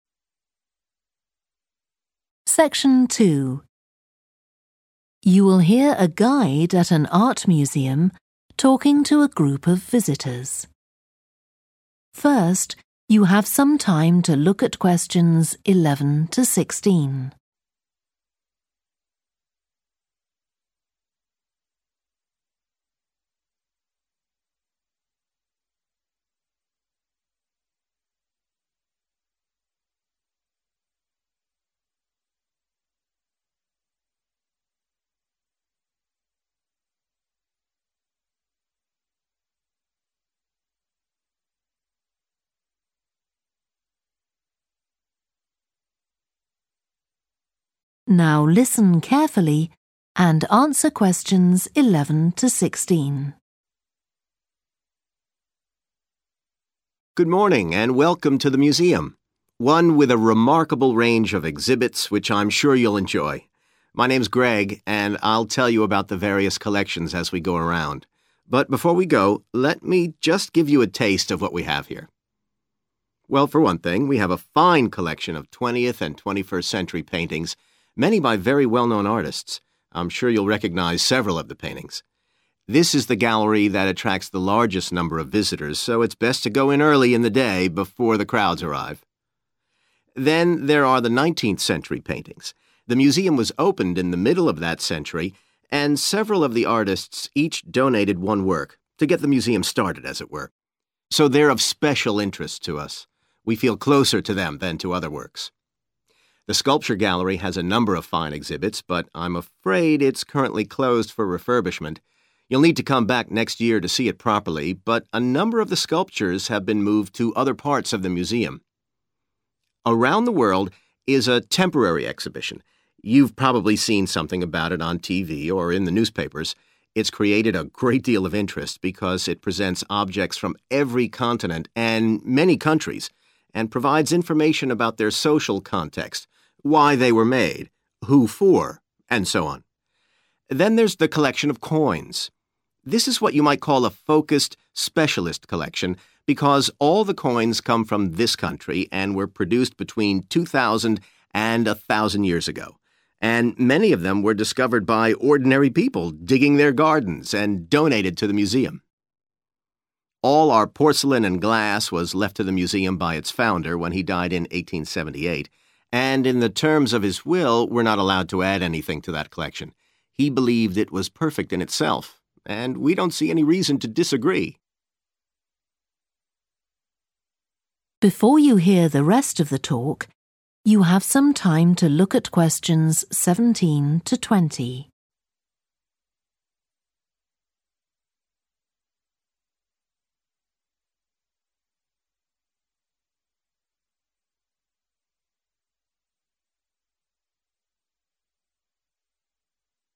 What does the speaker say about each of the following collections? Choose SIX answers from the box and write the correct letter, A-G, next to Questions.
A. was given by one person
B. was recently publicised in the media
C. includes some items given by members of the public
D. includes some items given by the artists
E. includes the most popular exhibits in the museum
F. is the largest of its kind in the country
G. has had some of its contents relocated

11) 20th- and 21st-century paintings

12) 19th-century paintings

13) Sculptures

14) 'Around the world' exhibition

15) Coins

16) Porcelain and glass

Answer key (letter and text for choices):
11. E. includes the most popular exhibits in the museum
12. D. includes some items given by the artists
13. G. has had some of its contents relocated
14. B. was recently publicised in the media
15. C. includes some items given by members of the public
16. A. was given by one person

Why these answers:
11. This is the gallery that attracts the largest number of visitors Excerpt/Transcript Explanation: The transcript is saying that this particular gallery is very popular and many people come to visit it. Answer Explanation: The answer choice 'E' means that the collection includes the most popular exhibits in the museum. Reason For Correctness: The correct answer is 'E' because the excerpt mentions that this gallery attracts the largest number of visitors, indicating that the 20th- and 21st-century paintings collection includes the most popular exhibits in the museum.
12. several of the artists each donated one work Excerpt/Transcript Explanation: The transcript mentions that several artists each gave one of their artworks. Answer Explanation: The answer choice 'D' means that the collection includes some items given by the artists. Reason For Correctness: The correct answer is 'D' because the excerpt specifically states that artists donated some of their works, indicating that the collection includes items given directly by the artists.
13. a number of the sculptures have been moved to other parts of the museum. Excerpt/Transcript Explanation: The transcript mentions that some of the sculptures have been relocated to different parts of the museum. Answer Explanation: The answer suggests that some contents of the collection have been relocated. Reason For Correctness: The correct answer 'G' is supported by the excerpt that explicitly states that sculptures (part of the collection) have been moved within the museum, indicating that the collection has had some of its contents relocated.
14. 'Around the world' is a temporary exhibition – you've probably seen something about it on TV or in the newspapers Excerpt/Transcript Explanation: The transcript mentions that the 'Around the world' exhibition has been talked about in the media like on TV or in newspapers. Answer Explanation: The answer indicates that the exhibition was recently publicised in the media. Reason For Correctness: The correct answer is 'B' because the statement in the excerpt directly mentions that the exhibition has been publicised in the media, matching the description provided for answer choice 'B'.
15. And many of them were discovered by ordinary people digging their gardens and donated to the museum! Excerpt/Transcript Explanation: The transcript discusses how many coins in the collection were found by regular people while they were gardening and then given to the museum. Answer Explanation: The answer suggests that the collection of coins includes some items given by members of the public. Reason For Correctness: The correct answer is 'C' because the excerpt mentions that ordinary people found many of the coins and donated them to the museum, indicating that the collection includes items given by members of the public.
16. All our porcelain and glass we left to the museum by its founder Excerpt/Transcript Explanation: The transcript tells us that all the porcelain and glass items were given to the museum by the person who started the museum. Answer Explanation: The answer 'A' means that the collection was given by one person. Reason For Correctness: The correct answer is 'A' because the excerpt explicitly states that all the porcelain and glass in the collection were left to the museum by its founder, which indicates that it was given by one person.

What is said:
Good morning, and welcome to the museum – one with a remarkable range of exhibits, which I'm sure you'll enjoy. My name's Greg, and I'll tell you about the various collections as we go round. But before we go, let me just give you a taste of what we have here.
Well, for one thing, we have a fine collection of twentieth and twenty-first century paintings, many by very well-known artists. I'm sure you'll recognise several of the paintings. This is the gallery that attracts the largest number of visitors, so it's best to go in early in the day, before the crowds arrive.
The there are the nineteenth-century paintings. The museum was opened in the middle of that century, and several of the artists each donated one work – to get the museum started, as it were. So they're of special interest to us – we feel closer to them than to other works.
The sculpture gallery has a number of fine exhibits, but I'm afraid it's currently closed for refurbishment. You'll need to come back next year to see it properly, but a number of the sculptures have been moved to other parts of the museum.
'Around the world' is a temporary exhibition – you've probably seen something about it on TV or in the newspapers. It's created a great deal of interest, because it presents objects from every continent and many countries, and provides information about their social context – why they were made, who for, and so on.
Then there's the collection of coins. This is what you might call a focused, specialist collection, because all the coins come from this country, and were produced between two thousand and a thousand years ago. And many of them were discovered by ordinary people digging their gardens and donated to the museum!
All our porcelain and glass we left to the museum by its founder, when he died in 1878. And in the terms of his will, we're not allowed to add anything to that collection: he believed it was perfect in itself, and we don't see any reason to disagree!